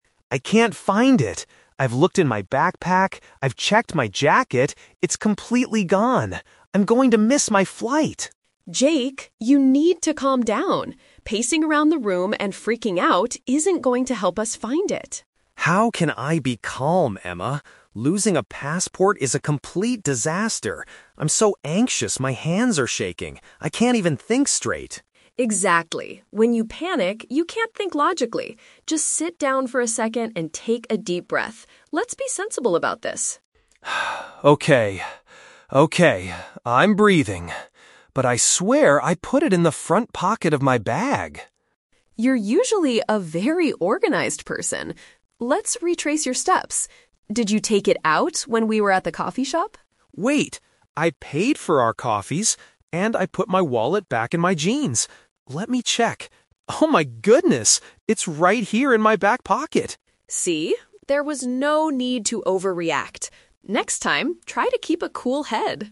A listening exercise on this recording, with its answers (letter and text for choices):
Listen to a conversation between two friends, Jake and Emma. For each question, choose the correct answer A, B, or (C).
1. How is Jake behaving at the beginning of the conversation?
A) He is acting in a highly sensible and organized way.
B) He is angrily blaming Emma for stealing his passport.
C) He is walking nervously and losing control of his emotions.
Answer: C) He is walking nervously and losing control of his emotions.

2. What is Emma's main advice to Jake?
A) To relax physically so he can think more clearly.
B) To immediately call the airport and cancel his flight.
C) To go back to the coffee shop and search for his bag.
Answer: A) To relax physically so he can think more clearly.

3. Where does Jake eventually find his passport?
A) Inside the front pocket of his backpack.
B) Inside the trousers he is currently wearing.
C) Inside his jacket that he left at the coffee shop.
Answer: B) Inside the trousers he is currently wearing.

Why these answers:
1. Emma says Jake is "pacing around the room and freaking out," and Jake says he is so anxious his "hands are shaking." Option C is a great paraphrase of this panicked behavior.
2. Emma tells Jake to "sit down for a second and take a deep breath" (relax physically) because when you panic, "you can't think logically" (think clearly).
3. Jake says he put his wallet back in his "jeans" and finds the passport "right here in my back pocket." Jeans are a type of trousers.

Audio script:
Jake: I can't find it! I've looked in my backpack, I've checked my jacket... it's completely gone. I'm going to miss my flight!
Emma: Jake, you need to calm down. Pacing around the room and freaking out isn't going to help us find it.
Jake: How can I be calm, Emma? Losing a passport is a complete disaster. I'm so anxious my hands are shaking. I can't even think straight.
Emma: Exactly. When you panic, you can't think logically. Just sit down for a second and take a deep breath. Let's be sensible about this.
Jake: Okay... okay. I'm breathing. But I swear I put it in the front pocket of my bag.
Emma: You're usually a very organized person. Let's retrace your steps. Did you take it out when we were at the coffee shop?
Jake: Wait. I paid for our coffees... and I put my wallet back in my jeans. Let me check... Oh my goodness. It's right here in my back pocket!
Emma: See? There was no need to overreact. Next time, try to keep a cool head!